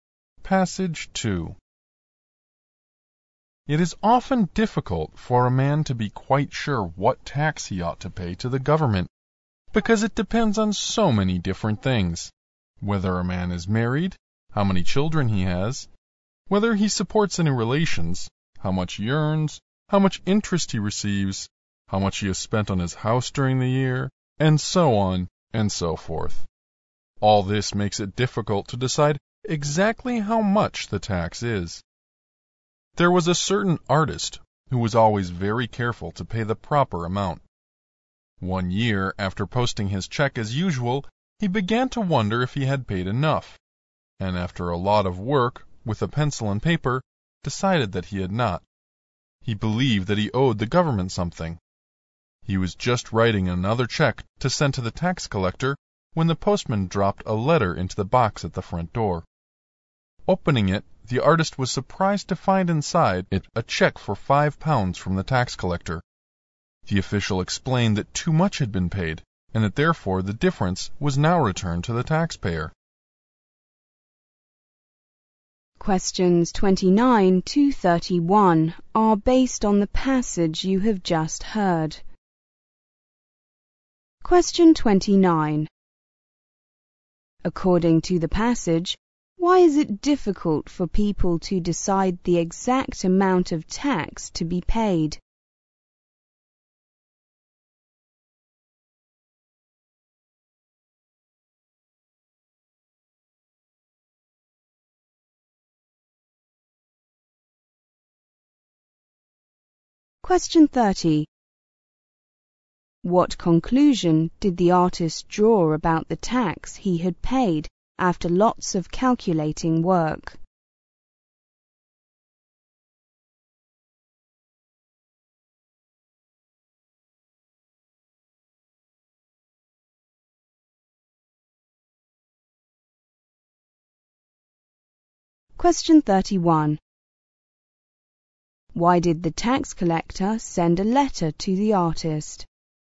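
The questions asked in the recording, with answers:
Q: According to the passage, why is it difficult for people to decide the exact amount of tax to be paid?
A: Because it depends on many different things

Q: What conclusion did the artist draw about the tax he had paid after lots of calculating work?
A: He had not paid enough

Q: Why did the tax collector send a letter to the artist?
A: To return the £5 he had overpaid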